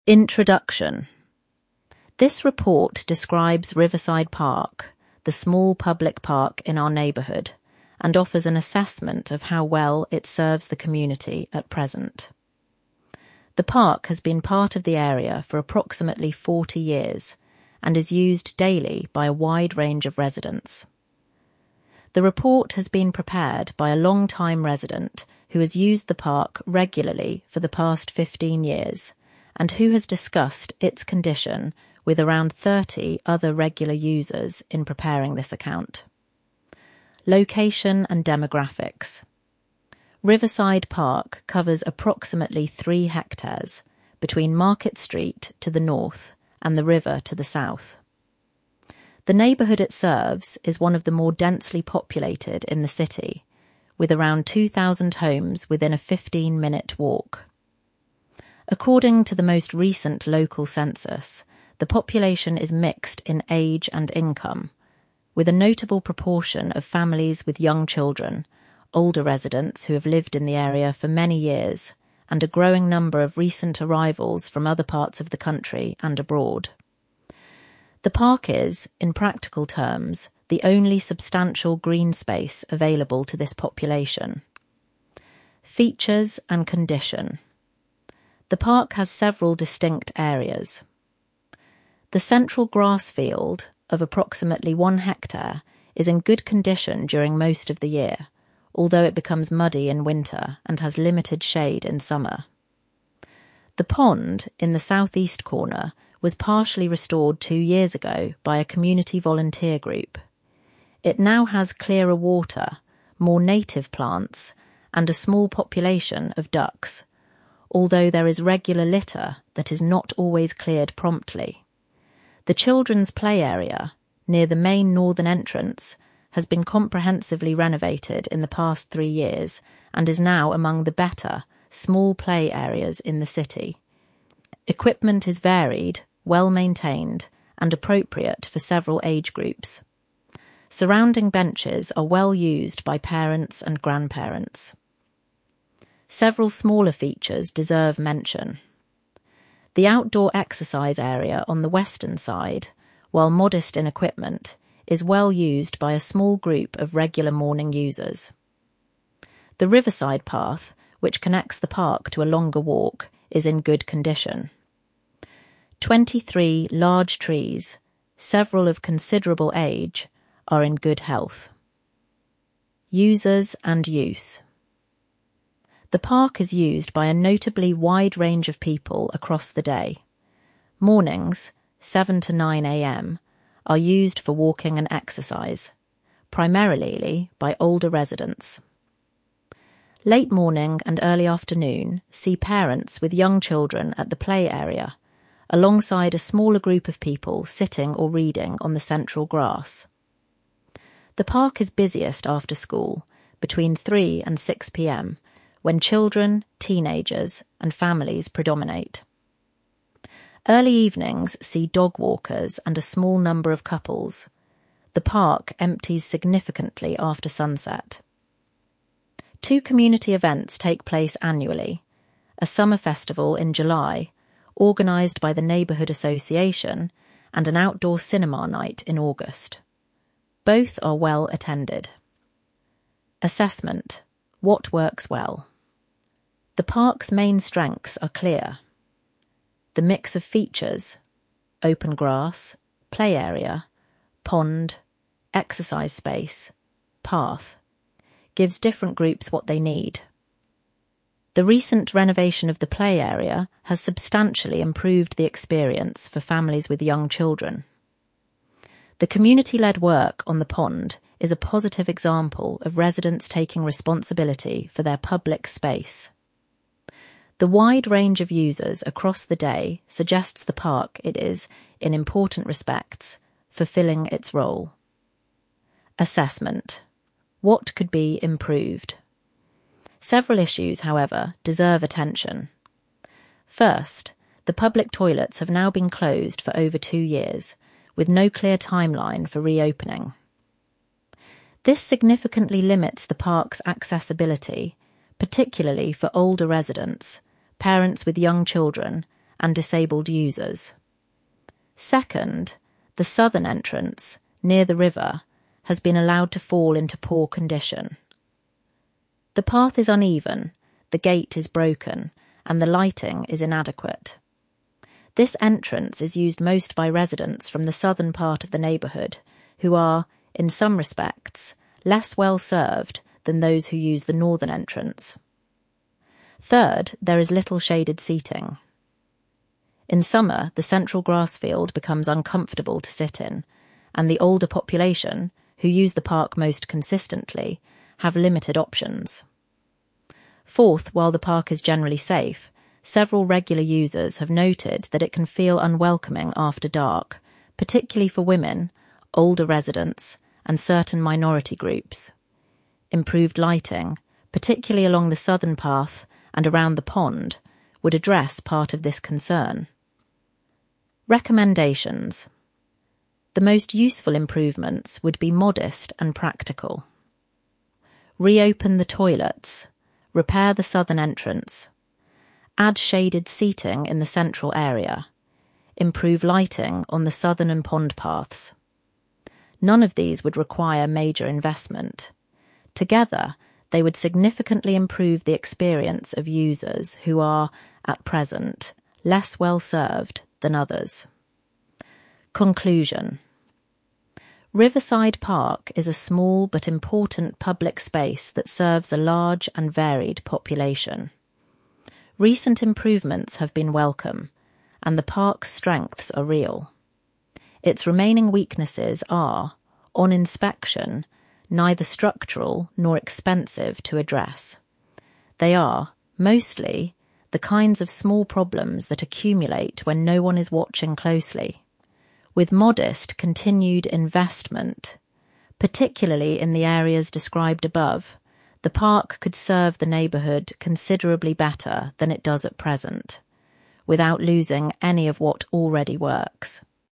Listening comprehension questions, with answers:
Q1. What does the report say about the population the park serves?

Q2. What does the report say about the central grass field?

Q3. Who restored the pond, and what was the result?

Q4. How does the report describe the play area?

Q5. What does the report identify as the park's main strengths?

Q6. What four issues does the report identify?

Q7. What recommendations does the report make?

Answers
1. It is one of the more densely populated neighbourhoods in the city, with around 2,000 homes within a fifteen-minute walk. The population is mixed in age and income, with families with young children, older long-term residents, and a growing number of recent arrivals.
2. Approximately one hectare; in good condition most of the year; muddy in winter; limited shade in summer.
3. A community volunteer group, two years ago. Result: clearer water, more native plants, a small population of ducks. But there is regular litter that is not always cleared promptly.
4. Comprehensively renovated in the past three years; now among the better small play areas in the city; equipment varied, well maintained, appropriate for several age groups.
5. (1) The mix of features gives different groups what they need. (2) The recent renovation of the play area substantially improved the experience for families. (3) The community-led pond work is a positive example. (4) The wide range of users across the day suggests the park is fulfilling its role.
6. (1) Public toilets closed for over two years, with no clear timeline. (2) The southern entrance has been allowed to fall into poor condition. (3) Little shaded seating. (4) The park can feel unwelcoming after dark, particularly for women, older residents, and certain minority groups.
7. Reopen the toilets; repair the southern entrance; add shaded seating in the central area; improve lighting on the southern and pond paths. The report says these would not require major investment but would significantly improve the experience of users who are currently less well served.

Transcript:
INTRODUCTION
This report describes Riverside Park, the small public park in our neighbourhood, and offers an assessment of how well it serves the community at present. The park has been part of the area for approximately forty years, and is used daily by a wide range of residents. The report has been prepared by a long-time resident who has used the park regularly for the past fifteen years and who has discussed its condition with around thirty other regular users in preparing this account.
LOCATION AND DEMOGRAPHICS
Riverside Park covers approximately three hectares, between Market Street to the north and the river to the south. The neighbourhood it serves is one of the more densely populated in the city, with around two thousand homes within a fifteen-minute walk. According to the most recent local census, the population is mixed in age and income, with a notable proportion of families with young children, older residents who have lived in the area for many years, and a growing number of recent arrivals from other parts of the country and abroad. The park is, in practical terms, the only substantial green space available to this population.
FEATURES AND CONDITION
The park has several distinct areas. The central grass field, of approximately one hectare, is in good condition during most of the year, although it becomes muddy in winter and has limited shade in summer. The pond, in the south-east corner, was partially restored two years ago by a community volunteer group; it now has clearer water, more native plants, and a small population of ducks, although there is regular litter that is not always cleared promptly.
The children's play area, near the main northern entrance, has been comprehensively renovated in the past three years and is now among the better small play areas in the city. Equipment is varied, well maintained, and appropriate for several age groups. Surrounding benches are well used by parents and grandparents.
Several smaller features deserve mention. The outdoor exercise area on the western side, while modest in equipment, is well used by a small group of regular morning users. The riverside path, which connects the park to a longer walk, is in good condition. Twenty-three large trees, several of considerable age, are in good health.
USERS AND USE
The park is used by a notably wide range of people across the day. Mornings (7–9 a.m.) are used for walking and exercise, primarily by older residents. Late morning and early afternoon see parents with young children at the play area, alongside a smaller group of people sitting or reading on the central grass. The park is busiest after school, between 3 and 6 p.m., when children, teenagers, and families predominate. Early evenings see dog-walkers and a small number of couples; the park empties significantly after sunset.
Two community events take place annually
a summer festival in July, organised by the neighbourhood association, and an outdoor cinema night in August. Both are well attended.
ASSESSMENT
WHAT WORKS WELL
The park's main strengths are clear. The mix of features (open grass, play area, pond, exercise space, path) gives different groups what they need. The recent renovation of the play area has substantially improved the experience for families with young children. The community-led work on the pond is a positive example of residents taking responsibility for their public space. The wide range of users across the day suggests the park is, in important respects, fulfilling its role.
ASSESSMENT
WHAT COULD BE IMPROVED
Several issues, however, deserve attention.
First, the public toilets have now been closed for over two years, with no clear timeline for reopening. This significantly limits the park's accessibility, particularly for older residents, parents with young children, and disabled users.
Second, the southern entrance, near the river, has been allowed to fall into poor condition. The path is uneven, the gate is broken, and the lighting is inadequate. This entrance is used most by residents from the southern part of the neighbourhood, who are, in some respects, less well served than those who use the northern entrance.
Third, there is little shaded seating. In summer, the central grass field becomes uncomfortable to sit in, and the older population — who use the park most consistently — have limited options.
Fourth, while the park is generally safe, several regular users have noted that it can feel unwelcoming after dark, particularly for women, older residents, and certain minority groups. Improved lighting, particularly along the southern path and around the pond, would address part of this concern.
RECOMMENDATIONS
The most useful improvements would be modest and practical: reopen the toilets; repair the southern entrance; add shaded seating in the central area; improve lighting on the southern and pond paths. None of these would require major investment. Together, they would significantly improve the experience of users who are, at present, less well served than others.
CONCLUSION
Riverside Park is a small but important public space that serves a large and varied population. Recent improvements have been welcome, and the park's strengths are real. Its remaining weaknesses are, on inspection, neither structural nor expensive to address; they are, mostly, the kinds of small problems that accumulate when no one is watching closely. With modest continued investment, particularly in the areas described above, the park could serve the neighbourhood considerably better than it does at present — without losing any of what already works.
assessment